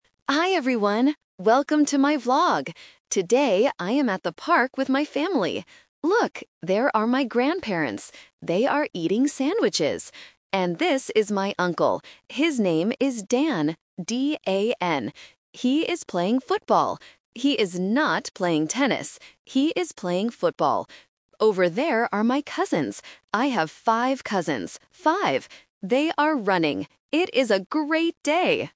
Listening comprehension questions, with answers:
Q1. What is the uncle's name?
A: Dan

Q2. What is the uncle doing?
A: He is playing football.

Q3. How many cousins does the vlogger have?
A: 5